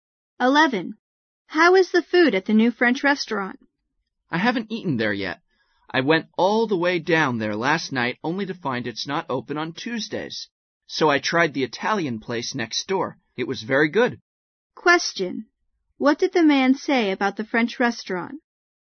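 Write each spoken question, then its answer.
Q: What did the man say about the French restaurant?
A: He hasn't eaten there; it is closed on Tuesdays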